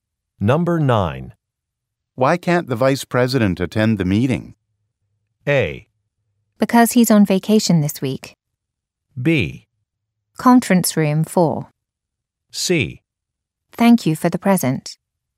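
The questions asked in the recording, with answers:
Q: Why can't the Vice President attend the meeting?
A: A: Because he's on vacation this week.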